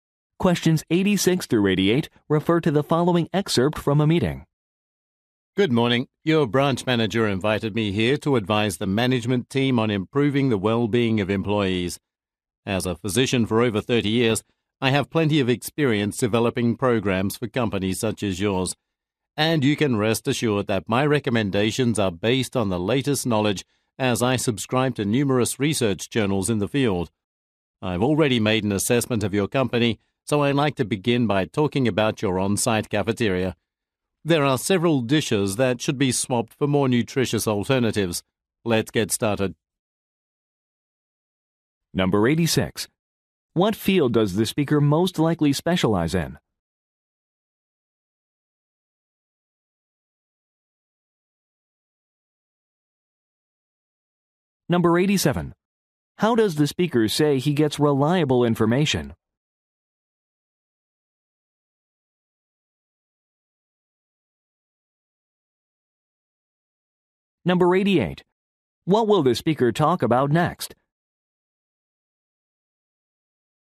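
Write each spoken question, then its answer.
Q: What field does the speaker most likely specialize in?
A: Medicine / employee health

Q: How does the speaker say he gets reliable information?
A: He subscribes to research journals

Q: What will the speaker talk about next?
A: The company cafeteria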